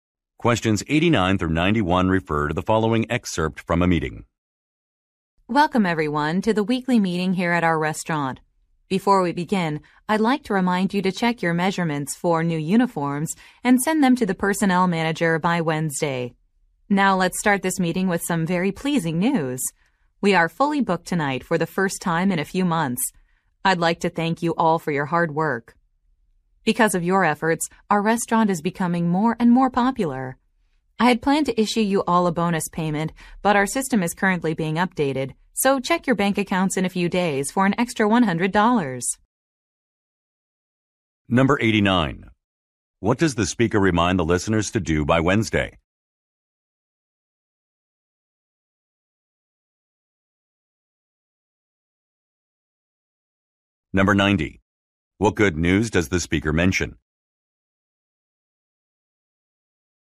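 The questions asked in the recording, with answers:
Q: What does the speaker remind the listeners to do by Wednesday?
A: Send uniform measurements to the personnel manager

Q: What good news does the speaker mention?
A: The restaurant is fully booked tonight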